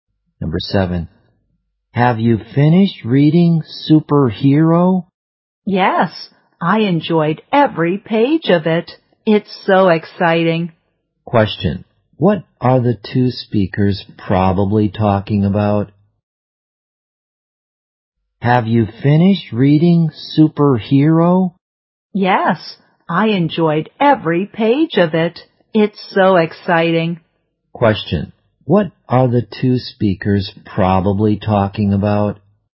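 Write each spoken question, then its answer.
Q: What are the two speakers probably talking about?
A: A book (Superhero).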